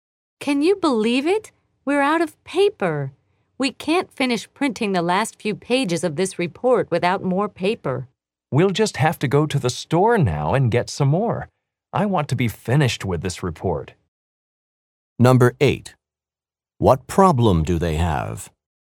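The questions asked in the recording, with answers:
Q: What problem do they have?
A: They have run out of paper for printing the report.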